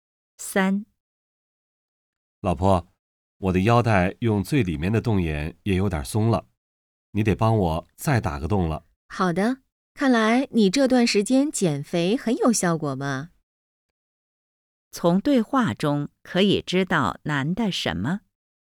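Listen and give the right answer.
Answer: 他减肥有效果,变瘦了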